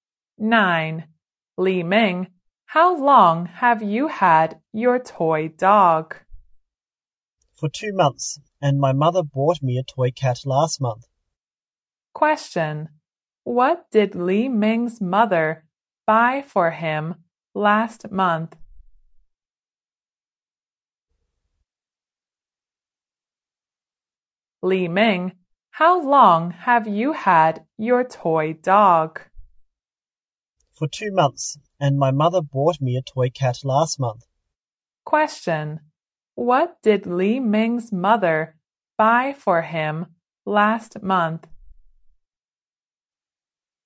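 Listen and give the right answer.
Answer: A toy cat.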